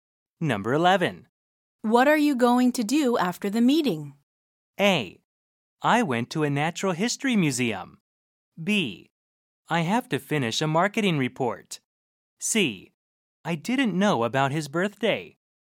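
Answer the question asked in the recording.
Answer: B: I have to finish a marketing report.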